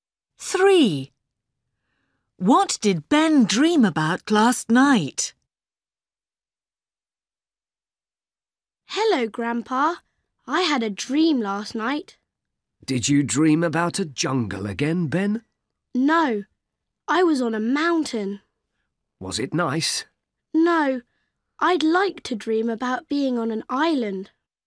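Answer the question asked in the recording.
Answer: Being on a mountain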